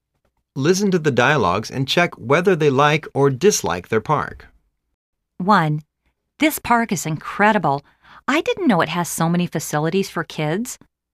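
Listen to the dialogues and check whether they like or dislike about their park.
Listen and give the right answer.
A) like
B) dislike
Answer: A) like

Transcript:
1.This park is incredible. I didn't know it has so many facilities for kids.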